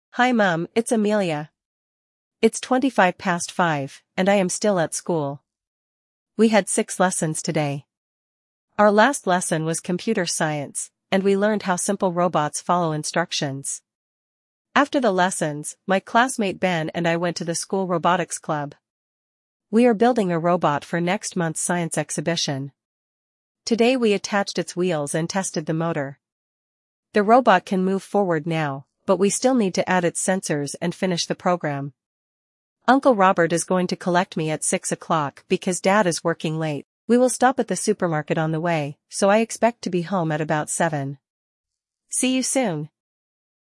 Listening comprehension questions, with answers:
Прослушайте текст и определите, какие из приведённых утверждений A–E соответствуют содержанию текста (1 — Right), а какие не соответствуют (2 — False). Вы услышите текст дважды.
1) Amelia is speaking to her mother.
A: Right

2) Amelia had six lessons at school today.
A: Right

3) Amelia went to the robotics club with her classmate Ben.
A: Right

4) Amelia and Ben finished building their robot.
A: False

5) Amelia is going to return home by car.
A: Right

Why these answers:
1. Амелия обращается к маме: Hi Mum, it's Amelia.
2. Амелия сообщает, что сегодня у неё было шесть уроков.
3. После занятий Амелия и её одноклассник Бен пошли в школьный кружок робототехники.
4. Робот ещё не закончен. Ученикам необходимо установить датчики и завершить программу.
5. Амелию заберёт дядя Роберт, поэтому домой она поедет на машине.

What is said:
We had six lessons today. Our last lesson was Computer Science, and we learned how simple robots follow instructions.
After the lessons, my classmate Ben and I went to the school robotics club. We are building a robot for next month's science exhibition. Today we attached its wheels and tested the motor. The robot can move forward now, but we still need to add its sensors and finish the program.
Uncle Robert is going to collect me at six o'clock because Dad is working late. We will stop at the supermarket on the way, so I expect to be home at about seven.
See you soon!

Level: 6 класса